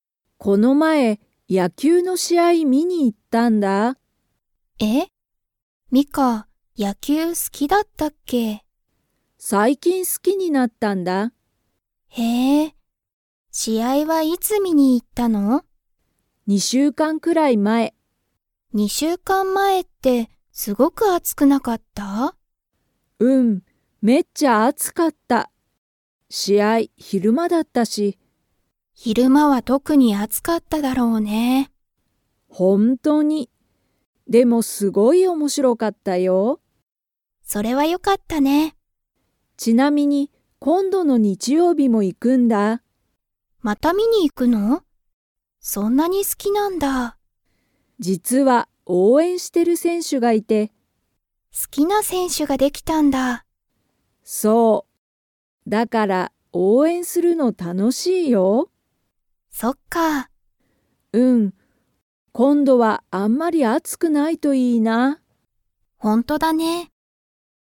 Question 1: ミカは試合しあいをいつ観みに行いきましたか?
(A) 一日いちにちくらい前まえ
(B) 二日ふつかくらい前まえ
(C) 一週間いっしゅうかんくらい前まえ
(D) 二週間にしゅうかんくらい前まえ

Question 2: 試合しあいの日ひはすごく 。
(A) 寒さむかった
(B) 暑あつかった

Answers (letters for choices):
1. D
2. B

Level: Level 4